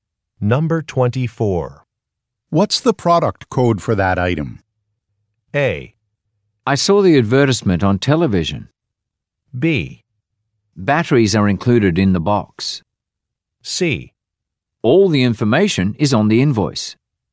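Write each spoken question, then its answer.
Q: What's the product code for that item?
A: C: All the information is on the invoice.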